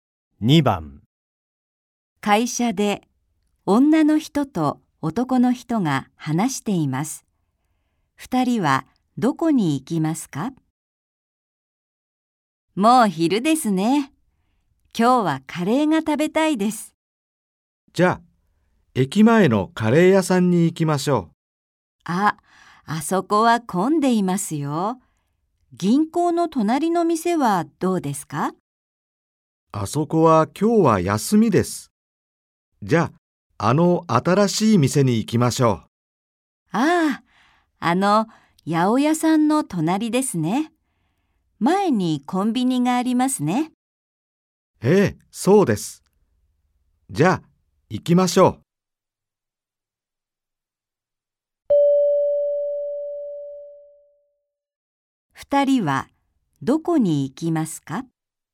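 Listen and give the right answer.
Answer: 八百屋の隣の新しいカレーの店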